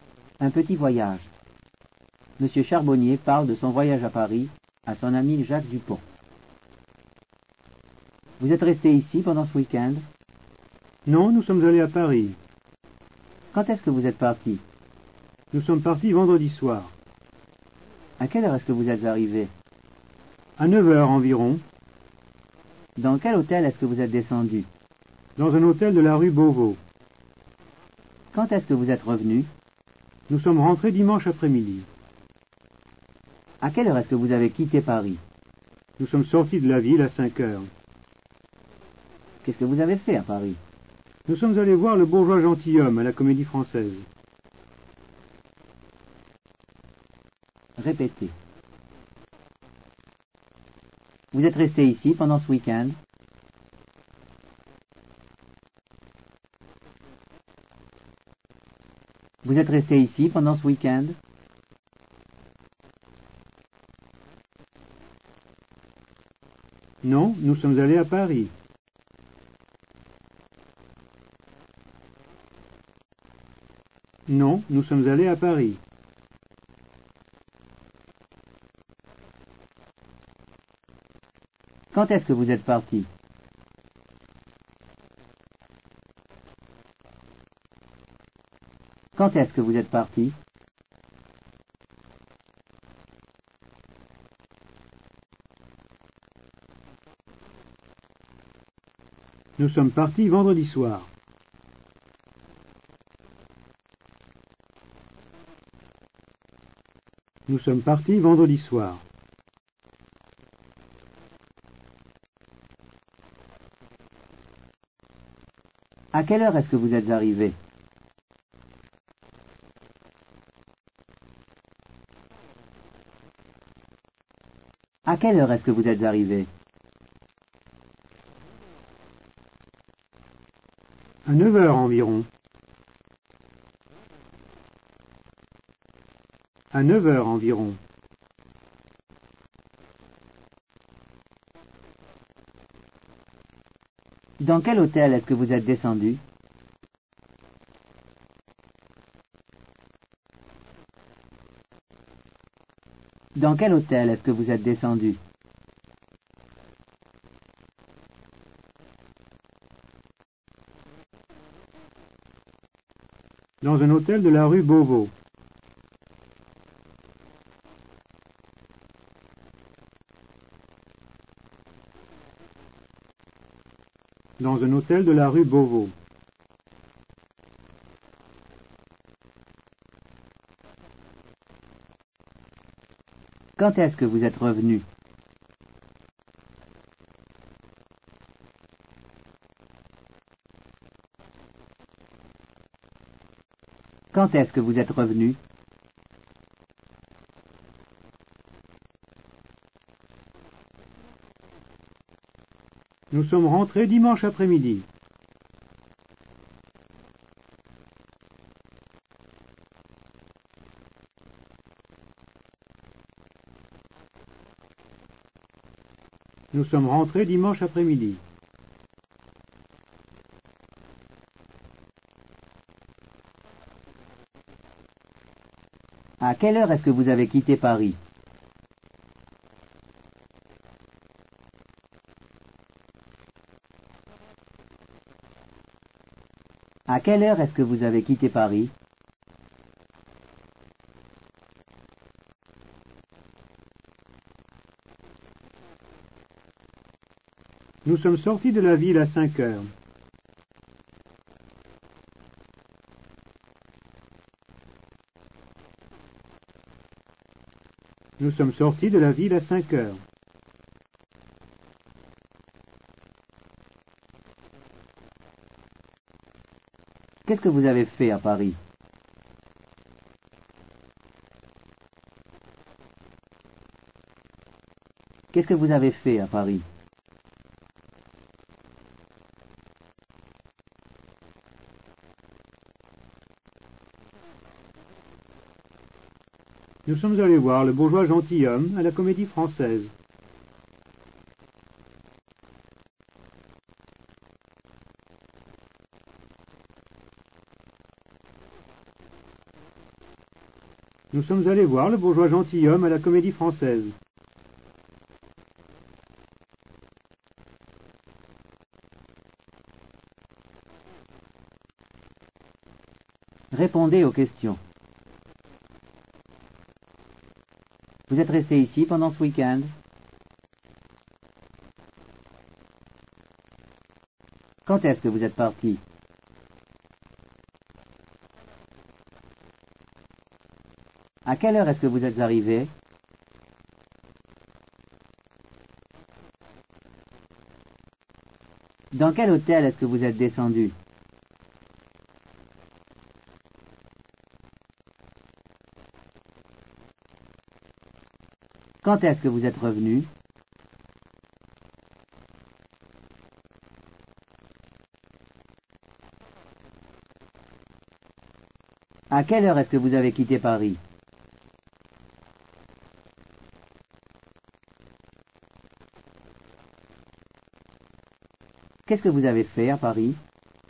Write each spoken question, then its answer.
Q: Vous êtes resté ici pendant ce week-end?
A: Non, nous sommes allés à Paris.

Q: Quand est-ce que vous êtes parti?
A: Nous sommes partis vendredi soir.

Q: À quelle heure est-ce que vous êtes arrivé?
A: À 9 h environ.

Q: Dans quel hôtel est-ce que vous êtes descendu?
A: Dans un hôtel de la rue Beauvau.

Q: Quand est-ce que vous êtes revenu?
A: Nous sommes rentrés dimanche après-midi.

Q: À quelle heure est-ce que vous avez quitté Paris?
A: Nous sommes sortis de la ville à 5 h.

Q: Qu'est-ce que vous avez fait à Paris?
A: Nous sommes allés voir le bourgeois gentilhomme à la Comédie française.